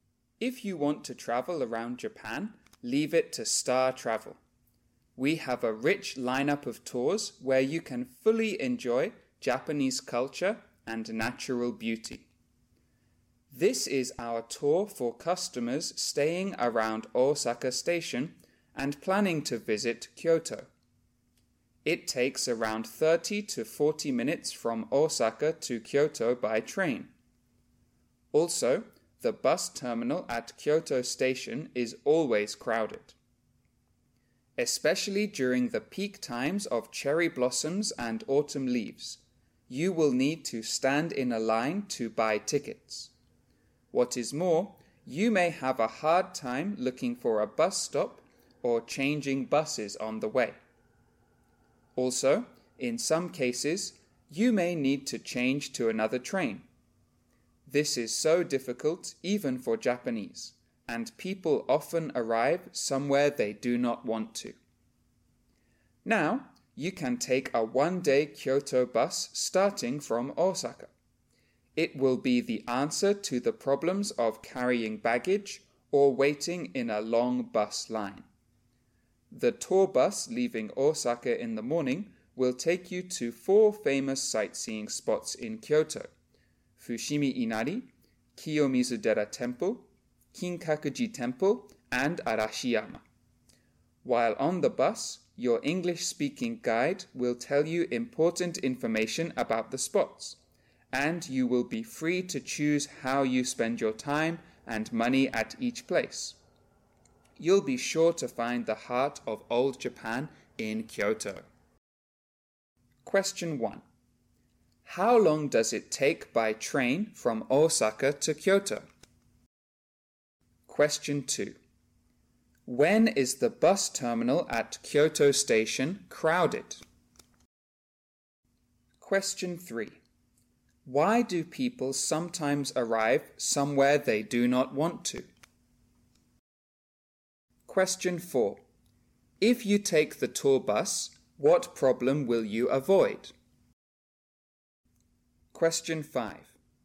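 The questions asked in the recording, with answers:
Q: How long does it take by train from Osaka to Kyoto?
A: About 30 to 40 minutes

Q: When is the bus terminal at Kyoto Station crowded?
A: Always, especially during the peak times of cherry blossoms and autumn leaves

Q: Why do people sometimes arrive somewhere they do not want to?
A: Finding bus stops, changing buses, or changing trains is difficult

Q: If you take the tour bus, what problem will you avoid?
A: Carrying baggage or waiting in a long bus line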